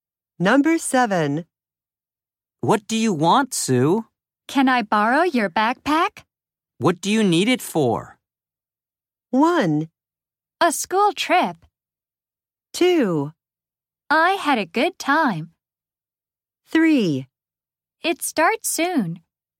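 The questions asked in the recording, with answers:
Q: What do you need it for?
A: 1: A school trip.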